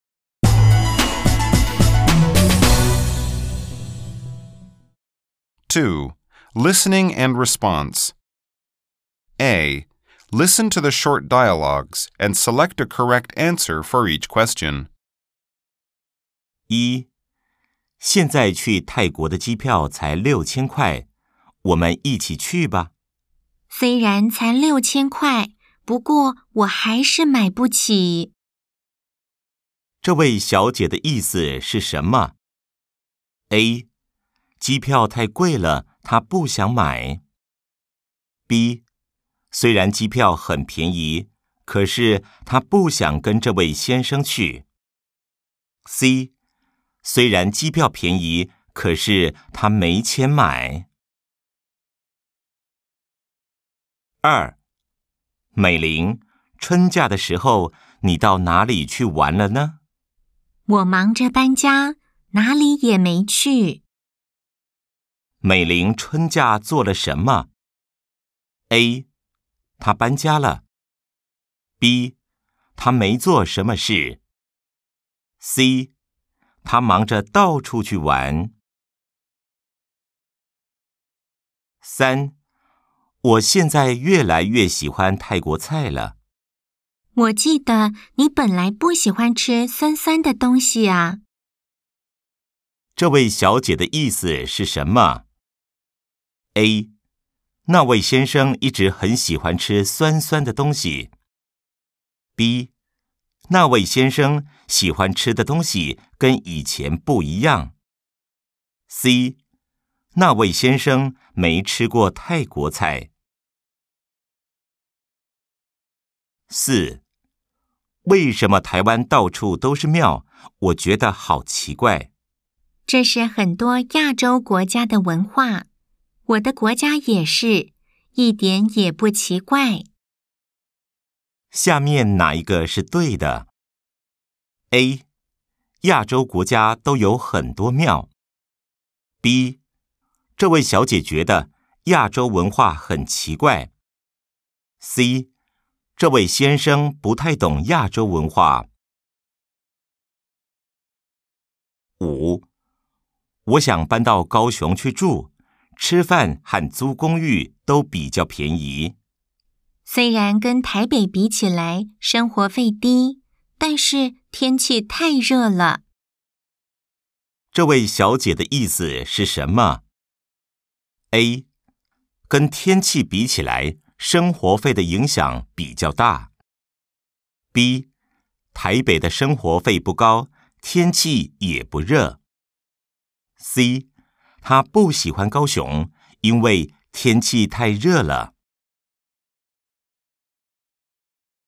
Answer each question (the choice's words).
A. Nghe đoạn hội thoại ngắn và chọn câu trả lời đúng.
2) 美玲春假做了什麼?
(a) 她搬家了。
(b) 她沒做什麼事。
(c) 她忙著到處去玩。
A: 她搬家了。

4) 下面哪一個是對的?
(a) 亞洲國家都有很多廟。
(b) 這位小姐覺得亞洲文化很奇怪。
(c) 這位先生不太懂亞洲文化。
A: 這位先生不太懂亞洲文化。

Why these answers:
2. Mỹ Linh nói cô ấy bận chuyển nhà (忙著搬家) và không đi đâu cả (哪裡也沒去), vì vậy đáp án đúng là a. 她搬家了。
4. Nam nói rằng có nhiều miếu ở Đài Loan là điều "kỳ lạ", còn nữ thì giải thích rằng đó là văn hóa phổ biến ở nhiều nước châu Á. Điều đó cho thấy nam không hiểu rõ văn hóa châu Á, nên đáp án đúng là c.